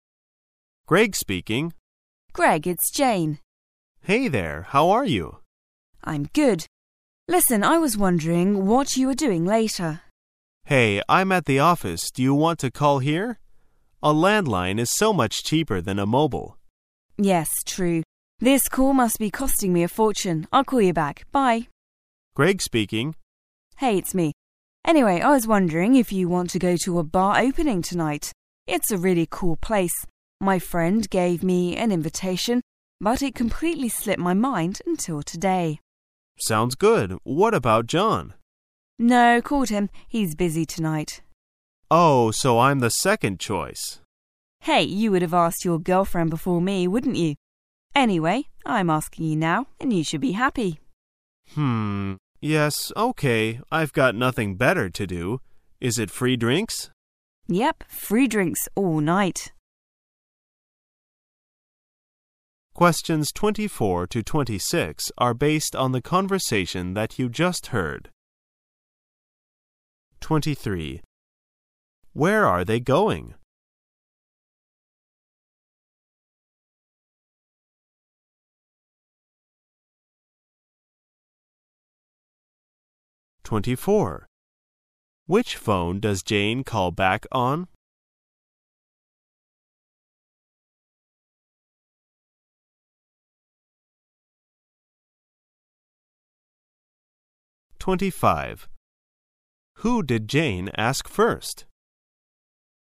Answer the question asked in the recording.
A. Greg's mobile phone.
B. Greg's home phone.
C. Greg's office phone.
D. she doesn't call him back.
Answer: C. Greg's office phone.

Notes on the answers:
此题考查听细节的能力,解题的关键点在于听到"I am at the office"与"landline"这里指固定电话。

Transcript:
[解析] 23-25 M: Greg speaking. W: Greg, it's Jane. M: Hey there, how are you? W: I'm good. Listen, I was wondering what you are doing later? M: Hey, I'm at the office, do you want to call here? A landline is so much cheaper than a mobile. W: Yes, true. This call must be costing me a fortune! I'll call you back. Bye. W: Hey, it's me. Anyway, I was wondering if you want to go to a bar opening tonight? It's a really cool place. My friend gave me an invitation, but it completely slipped my mind, until today. M: Sounds good. What about John? W: No called him, he's busy tonight. M: Oh, so I'm the second choice? W: Hey, you would have asked your girlfriend before me, wouldn't you'? Anyway, I'm asking you now and you should be happy! I've got nothing better to do. Is it free drinks? M: Yep. Free drinks ALL night! Where are they going?